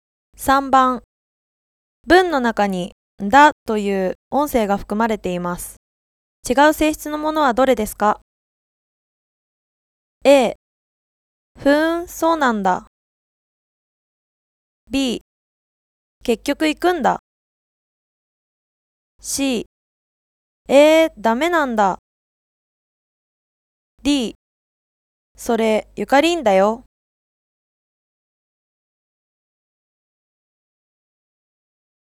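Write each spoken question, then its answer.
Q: 文の中に、だという音声が含まれています。違う性質のものはどれですか?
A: D: それ、ゆかりんだよ。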